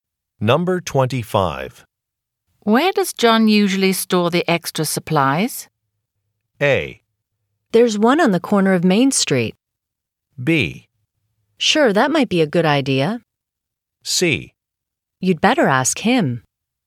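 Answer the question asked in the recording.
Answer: C: You'd better ask him.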